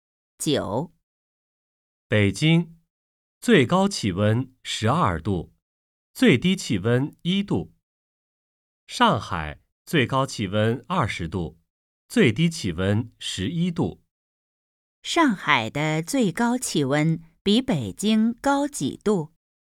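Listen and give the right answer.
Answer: 8度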